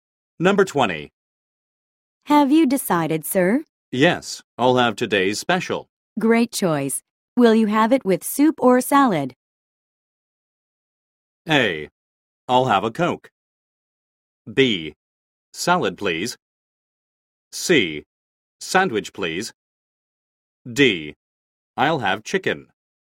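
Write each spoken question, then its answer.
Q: Great choice. Will you have it with soup or salad?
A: B: Salad, please.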